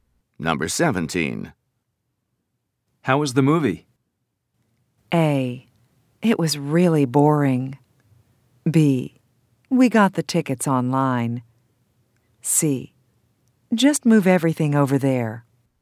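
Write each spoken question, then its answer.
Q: How was the movie?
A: A: It was really boring.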